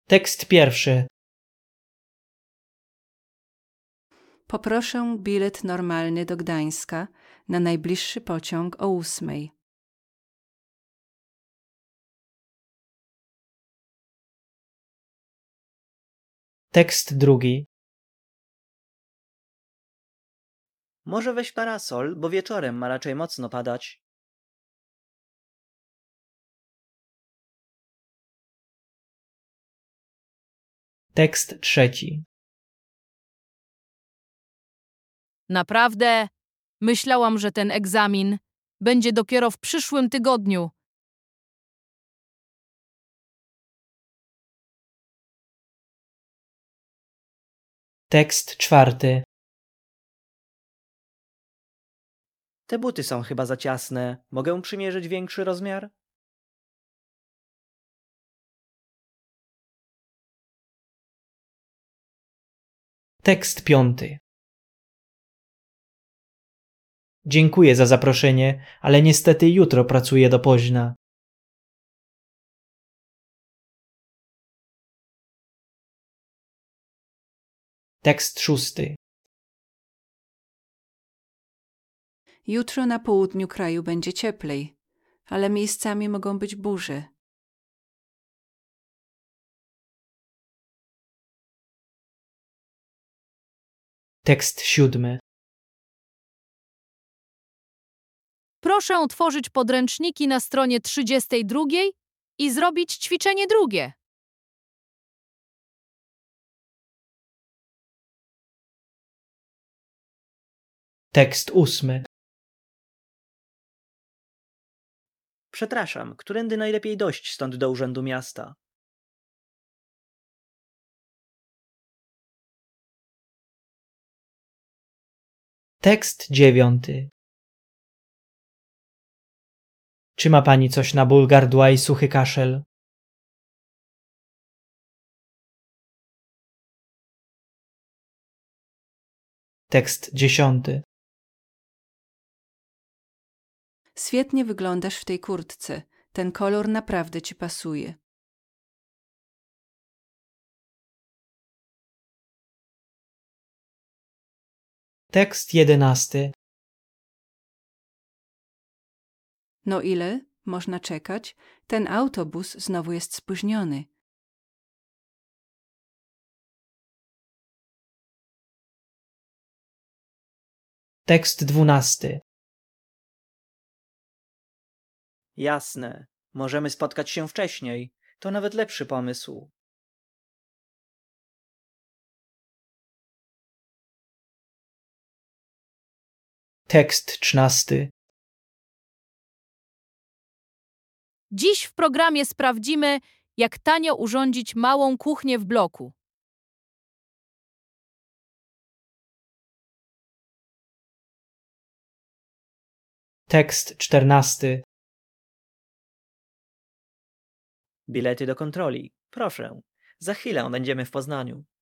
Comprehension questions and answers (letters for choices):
I. Proszę uważnie słuchać tego nagrania i wykonywać zadanie zgodnie z podanym przykładem. Uwaga! Nagranie zostanie odtworzone tylko jeden raz.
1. Ta wypowiedź dotyczy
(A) rozmiaru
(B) pogody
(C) czasu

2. Ta wypowiedź jest pytaniem o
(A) drogę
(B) cenę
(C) godzinę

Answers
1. A
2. A